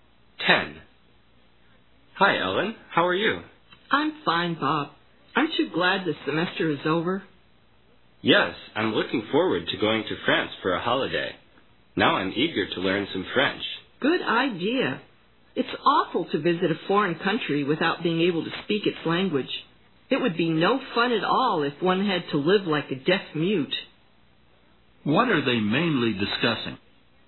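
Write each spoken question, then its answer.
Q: What are they mainly discussing?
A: Learning French before a holiday in France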